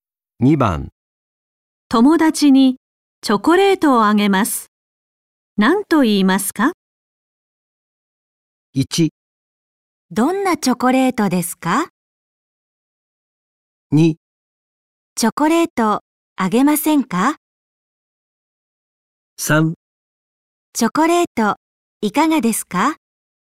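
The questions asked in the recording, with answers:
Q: 友達にチョコレートをあげます。何と言いますか?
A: 3: チョコレートいかがですか?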